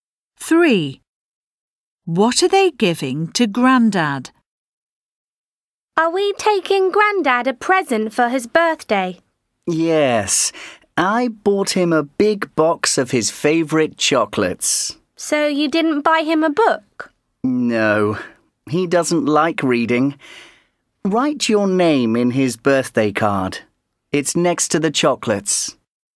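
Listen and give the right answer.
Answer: A big box of chocolates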